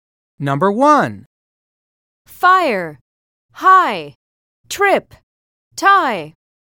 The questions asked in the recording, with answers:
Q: Fire, high, trip, tie.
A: Letter U is correct.